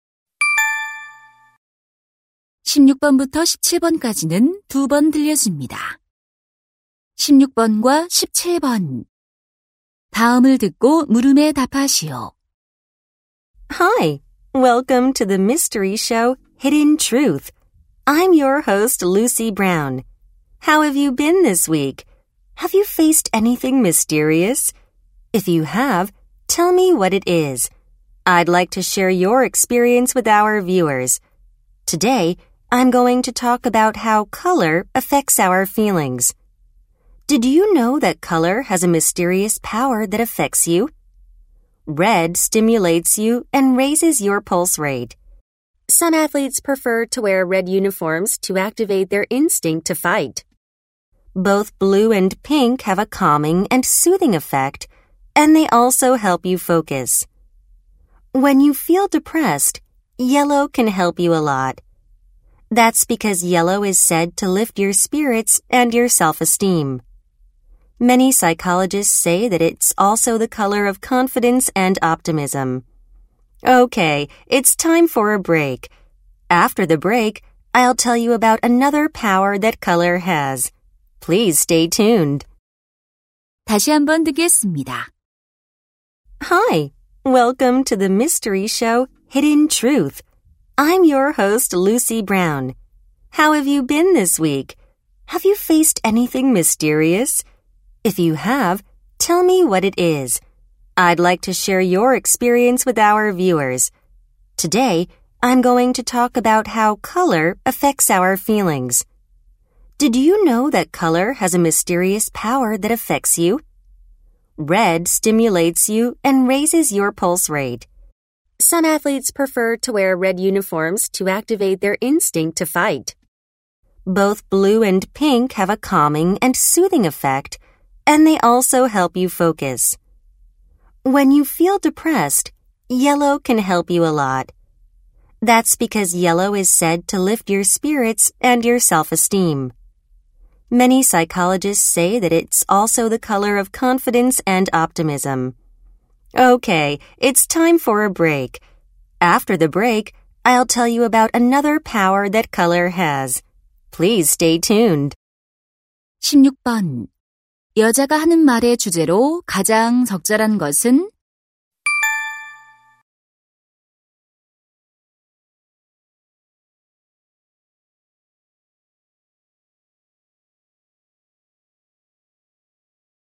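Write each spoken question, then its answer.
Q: 여자가 하는 말의 주제로 가장 적절한 것은?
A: 색깔이 감정에 미치는 영향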